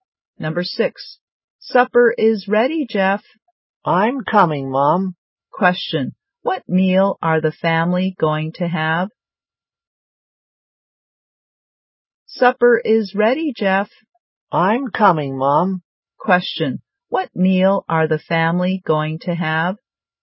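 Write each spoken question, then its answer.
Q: What meal are the family going to have?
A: Supper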